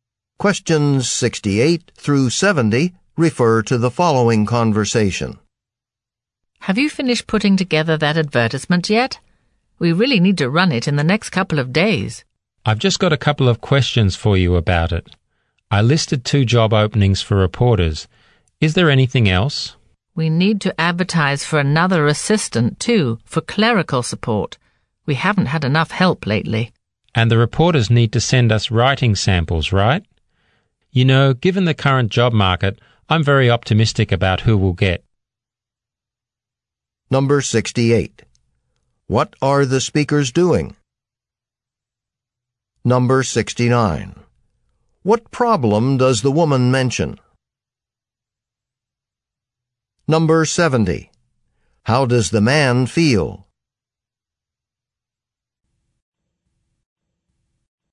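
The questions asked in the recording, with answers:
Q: What are the speakers doing?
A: Preparing a job advertisement

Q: What problem does the woman mention?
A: They haven't had enough help lately

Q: How does the man feel?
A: Optimistic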